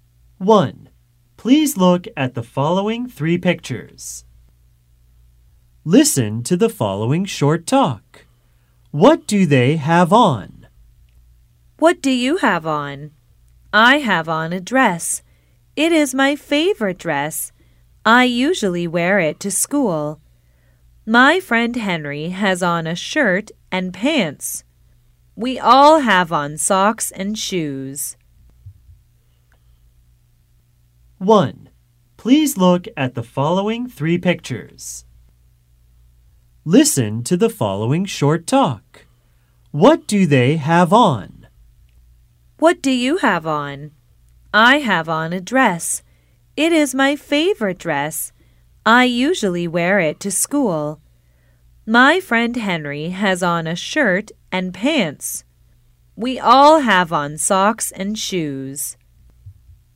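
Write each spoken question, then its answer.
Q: What do they have on?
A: A dress; a shirt and pants; socks and shoes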